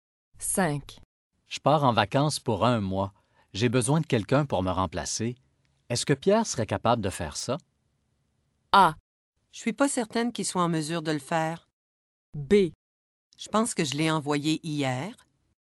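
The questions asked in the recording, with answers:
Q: Est-ce que Pierre serait capable de faire ça?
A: A: Je suis pas certaine qu'il soit en mesure de le faire.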